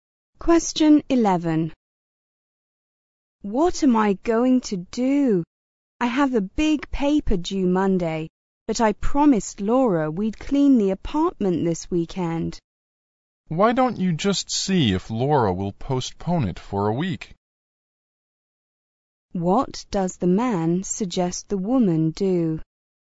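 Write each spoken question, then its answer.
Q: What does the man suggest the woman do?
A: Ask Laura to put off cleaning the apartment for a week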